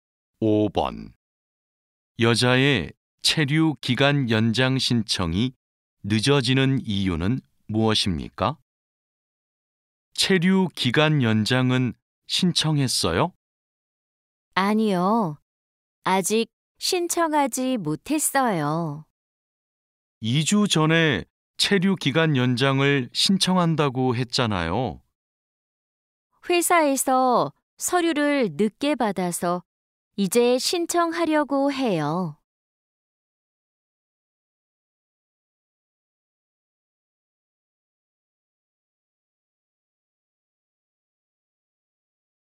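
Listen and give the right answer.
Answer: 회사에서 서류를 늦게 받아서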